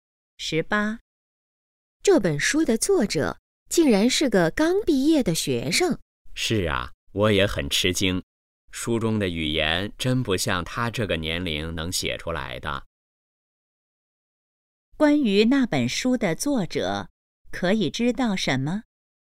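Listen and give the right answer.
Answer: 刚毕业,很年轻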